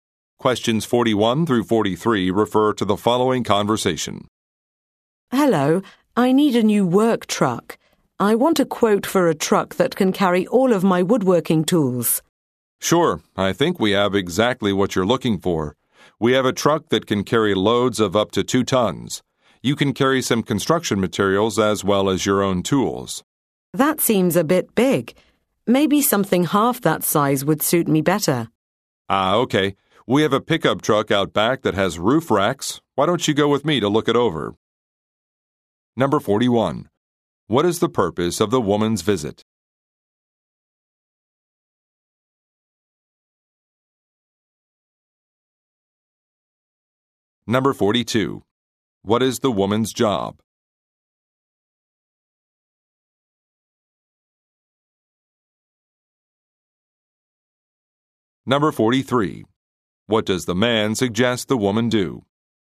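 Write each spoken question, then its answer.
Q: What is the purpose of the woman's visit?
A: To get a quote for a work truck

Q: What is the woman's job?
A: Woodworker

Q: What does the man suggest the woman do?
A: Go with him to look at a pickup truck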